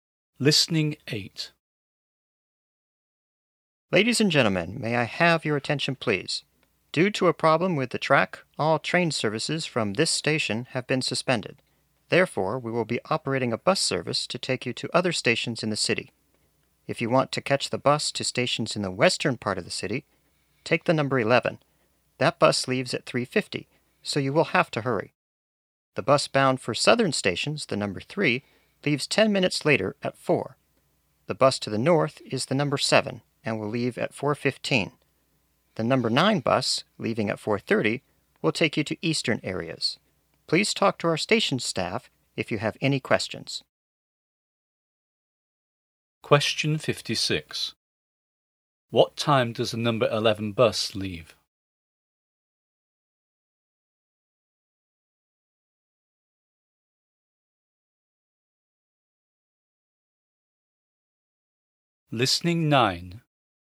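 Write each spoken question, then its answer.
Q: What time does the number 11 bus leave?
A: At 3:50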